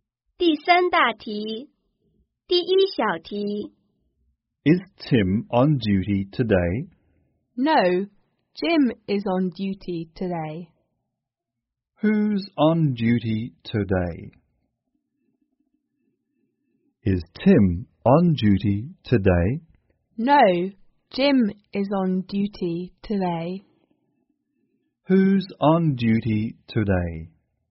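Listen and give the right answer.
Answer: Jim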